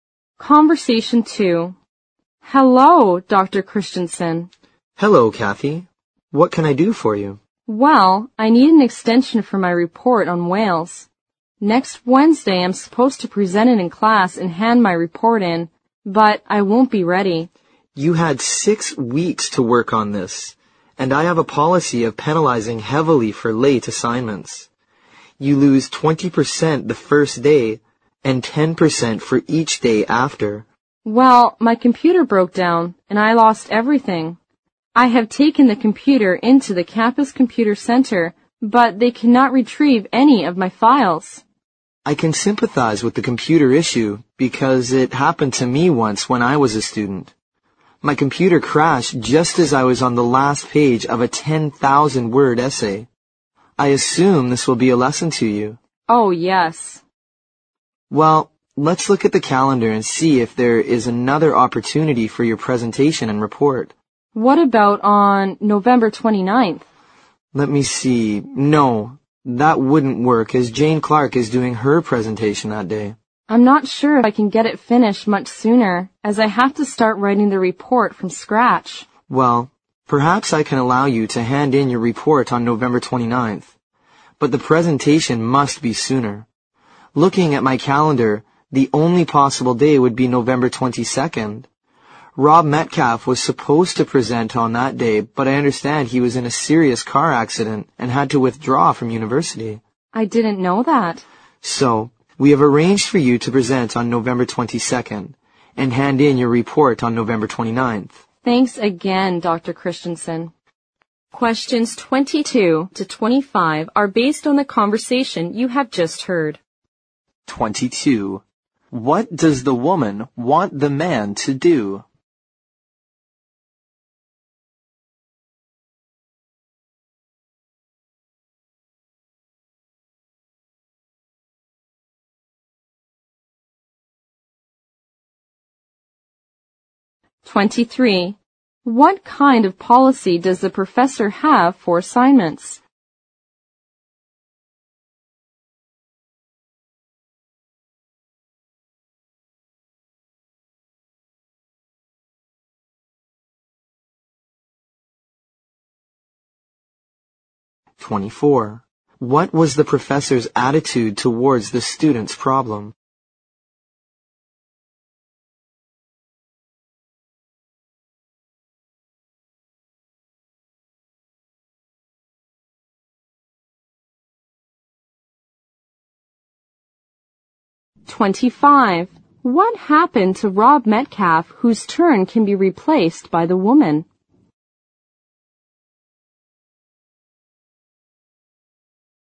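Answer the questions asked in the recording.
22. Give her an extension for her report
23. Penalizing heavily for late assignments
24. Sympathetic
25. He was in a serious car accident and withdrew from university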